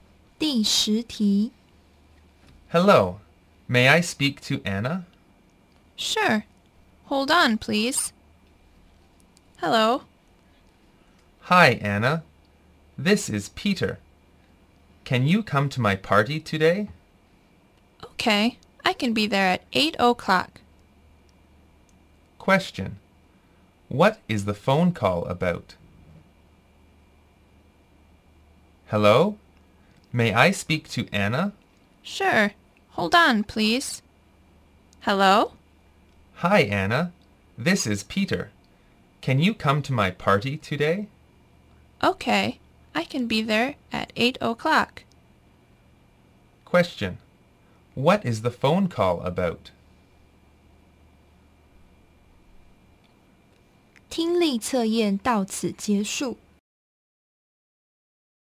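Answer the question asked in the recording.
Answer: Inviting Anna to Peter's party today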